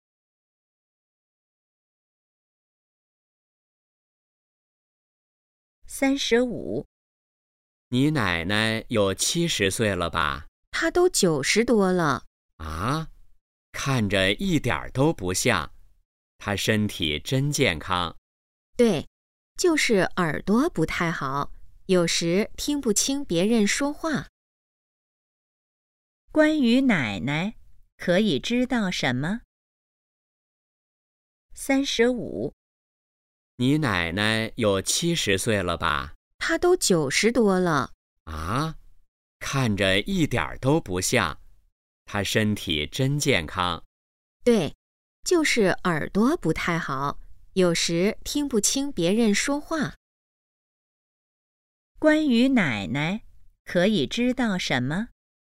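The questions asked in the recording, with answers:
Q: 关于奶奶,可以知道什么?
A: 九十多岁了,身体健康,但耳朵不太好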